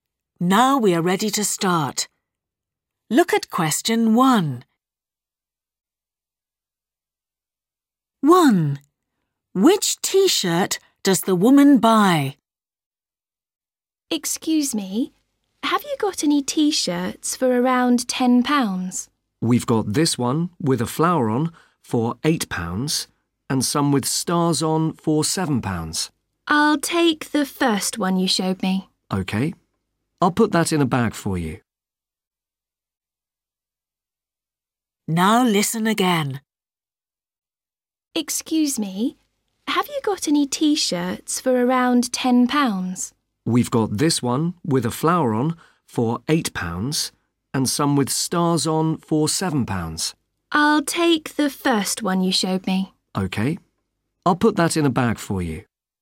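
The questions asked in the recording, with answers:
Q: Which T-shirt does the woman buy?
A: The one with a flower on (£8)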